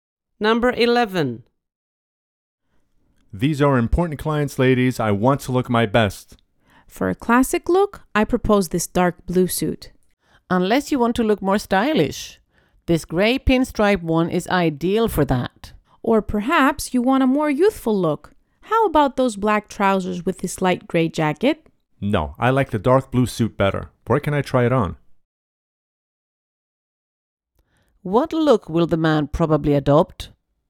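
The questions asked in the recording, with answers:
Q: What look will the man probably adopt?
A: A classic look (the dark blue suit)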